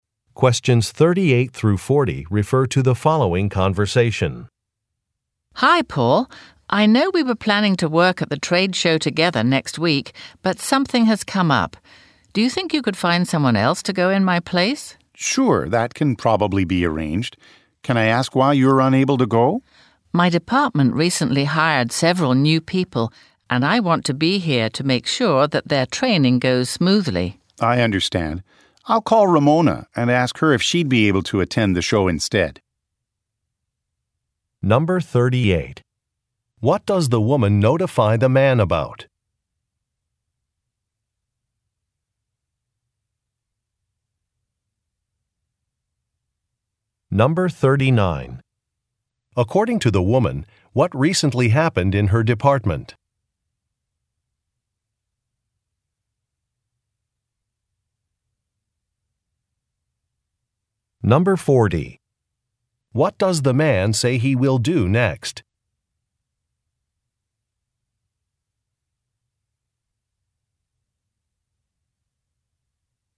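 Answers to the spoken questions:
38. She can't go to the trade show with him next week
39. Several new people were hired
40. Call Ramona and ask her to attend the show instead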